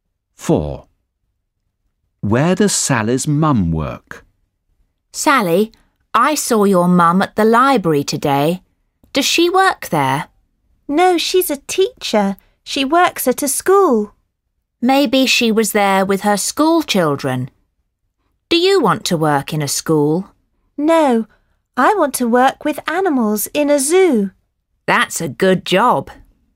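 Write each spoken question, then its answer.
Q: Where does Sally's mum work?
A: At a school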